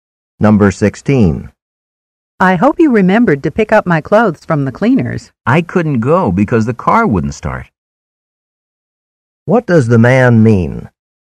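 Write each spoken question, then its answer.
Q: What does the man mean?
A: He didn't pick up the clothes because the car wouldn't start.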